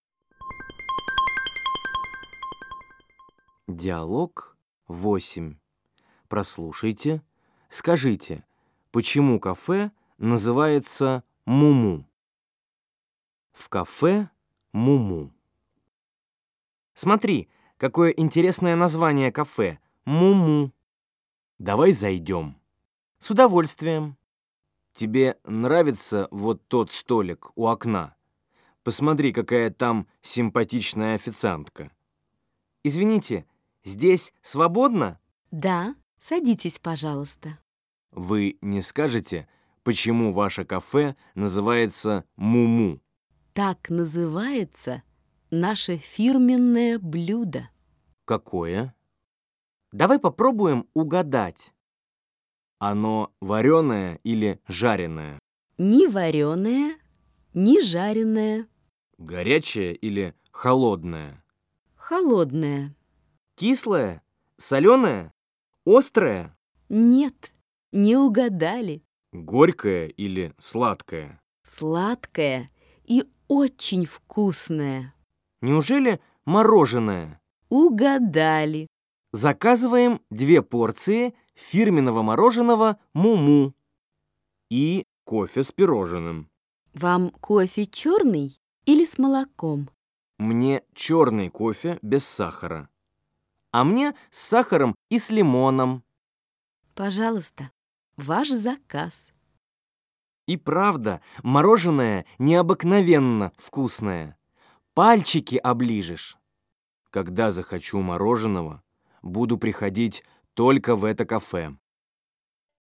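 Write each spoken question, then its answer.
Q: почему кафе называется «Муму»?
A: Так называется их фирменное блюдо — мороженое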